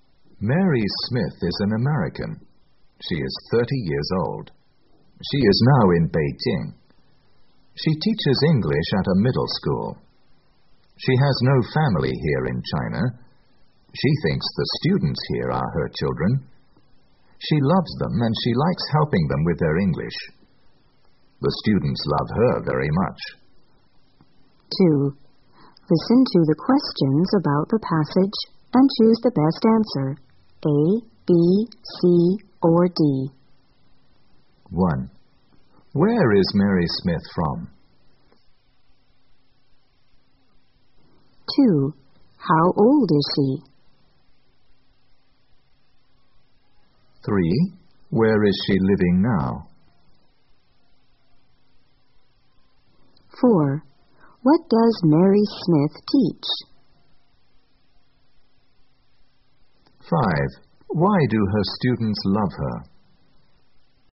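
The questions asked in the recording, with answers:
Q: Where is Mary Smith from?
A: America

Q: How old is she?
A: 30 years old

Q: Where is she living now?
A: In Beijing

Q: What does Mary Smith teach?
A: English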